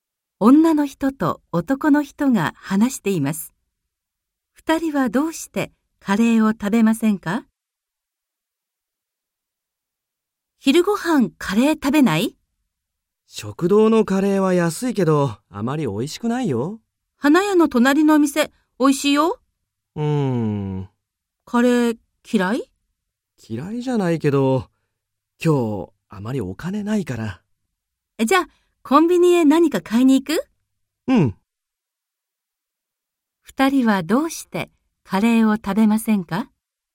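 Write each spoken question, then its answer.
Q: 二人はどうしてカレーを食べませんか?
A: 男の人が今日あまりお金がないから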